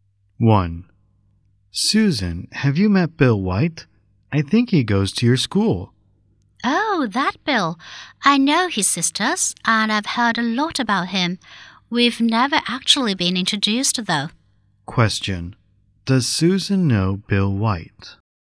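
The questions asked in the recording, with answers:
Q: Does Susan know Bill White?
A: She has heard of him but has never been introduced to him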